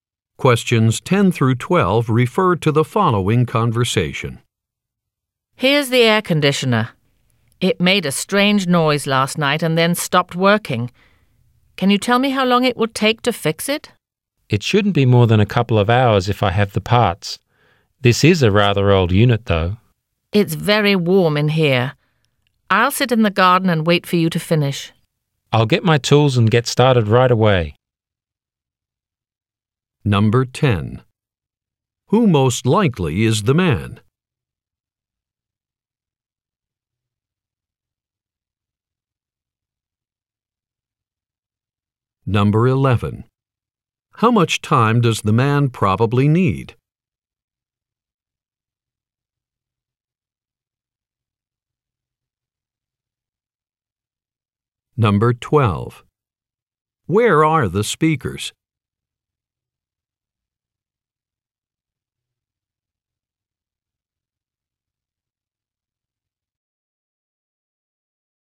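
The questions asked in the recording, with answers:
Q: Who most likely is the man?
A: A repairman

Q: How much time does the man probably need?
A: A couple of hours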